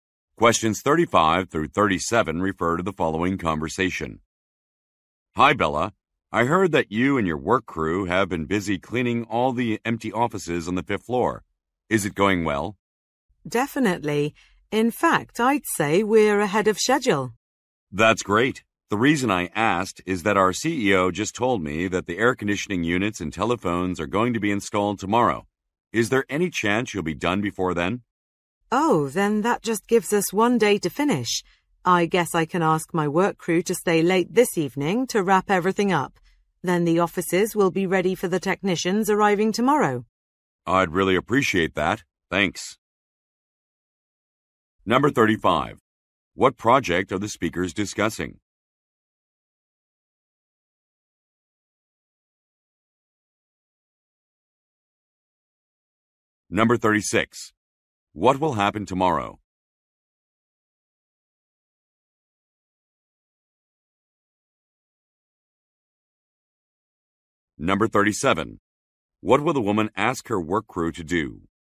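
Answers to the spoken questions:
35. Cleaning the empty offices on the 5th floor
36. Air conditioning units and telephones will be installed
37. Stay late this evening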